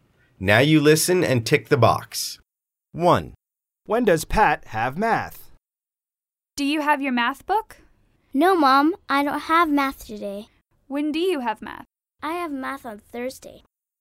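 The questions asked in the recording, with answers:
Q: When does Pat have math?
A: On Thursday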